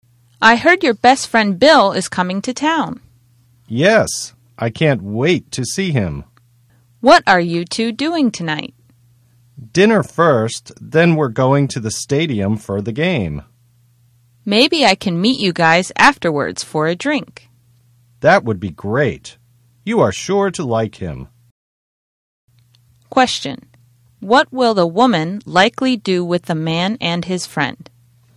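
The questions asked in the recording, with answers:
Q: Question. What will the woman likely do with the man and his friend?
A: Meet them for a drink after the game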